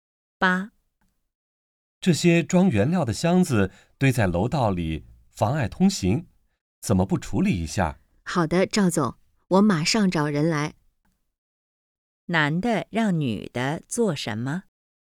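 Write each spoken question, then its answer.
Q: 男的让女的做什么?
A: 处理楼道里的箱子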